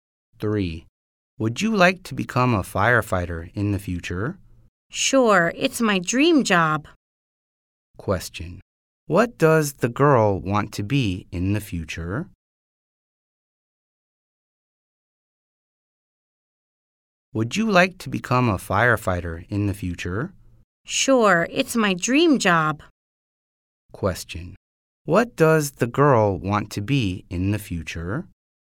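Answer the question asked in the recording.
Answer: A firefighter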